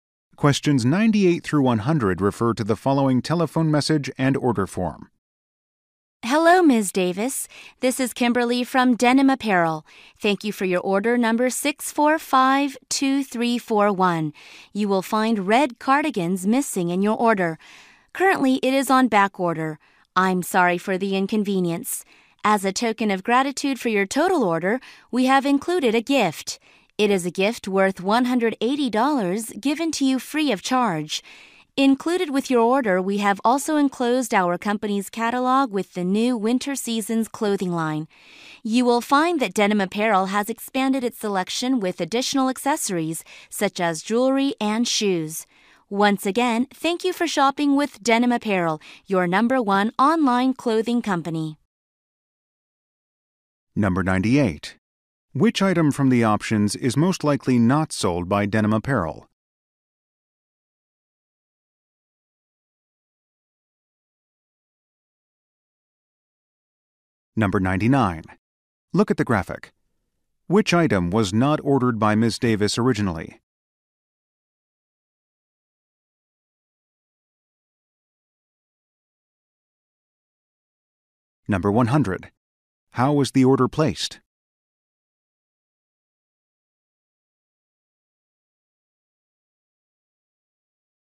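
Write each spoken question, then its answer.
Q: How was the order placed?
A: Online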